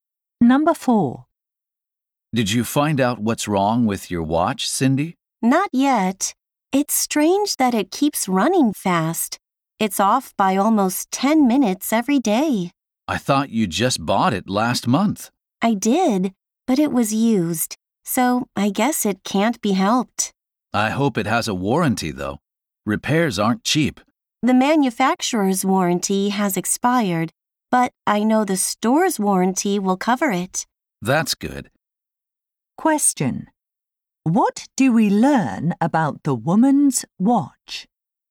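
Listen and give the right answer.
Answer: It was bought used and the store's warranty will cover the repair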